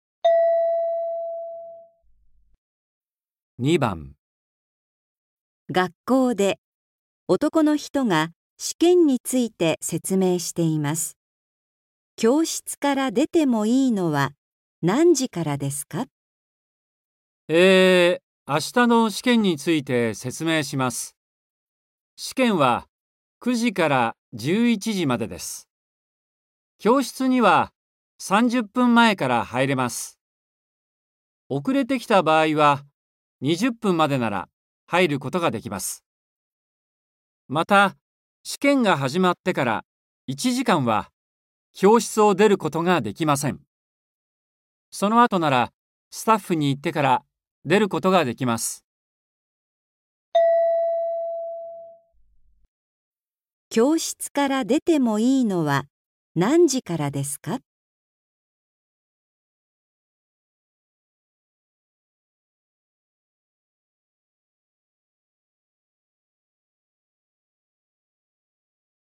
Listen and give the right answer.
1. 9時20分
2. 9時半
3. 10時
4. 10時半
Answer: 3. 10時

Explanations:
M: えー、明日の試験について説明します。試験は9時から11時までです。教室には30分前から入れます。遅れてきた場合は、20分までなら入ることができます。また、試験が始まってから1時間は教室を出ることができません。 あ、その後なら、スタッフに言ってから、出ることができます。

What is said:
M: えー、明日の試験について説明します。試験は9時から11時までです。教室には30分前から入れます。また、試験が始まってから1時間は教室を出ることができません。
あ、その後なら、スタッフに言ってから、出ることができます。
教室から出てもいいのは何時からですか。

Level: N4